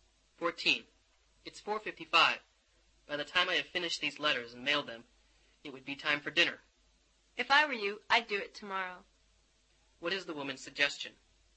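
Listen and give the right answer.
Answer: Do the letters tomorrow.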